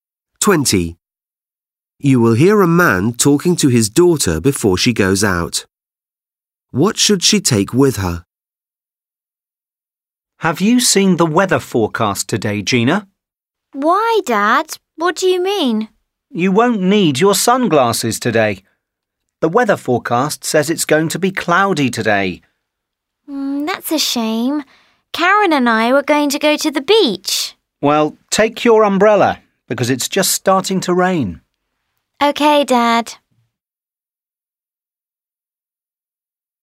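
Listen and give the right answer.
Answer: Her umbrella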